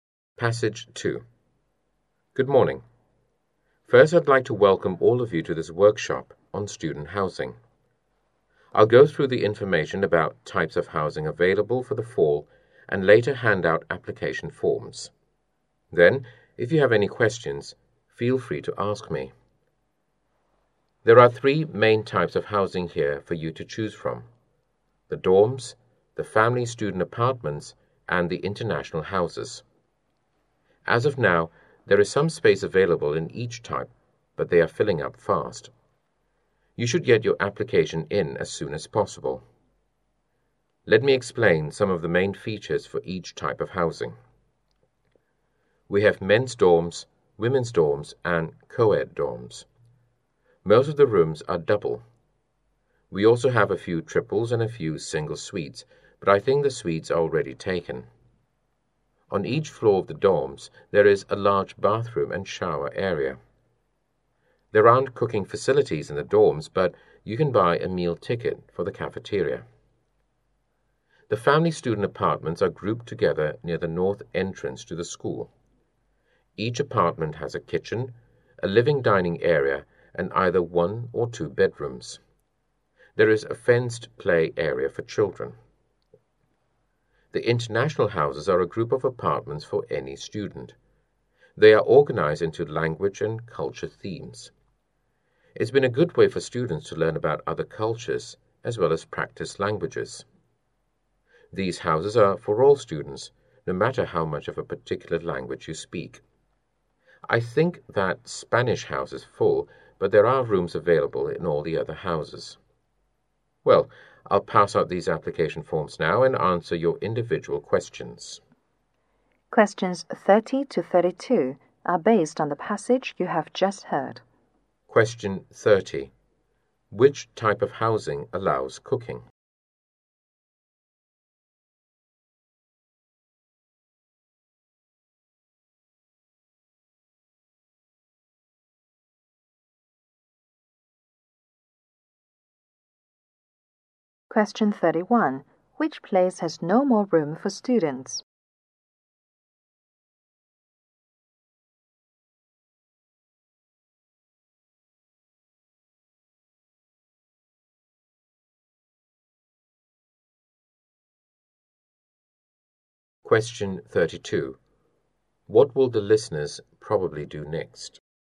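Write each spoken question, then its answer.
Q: Which type of housing allows cooking?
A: The family student apartments.

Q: Which place has no more room for students?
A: The Spanish house.

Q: What will the listeners probably do next?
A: Get application forms and ask questions.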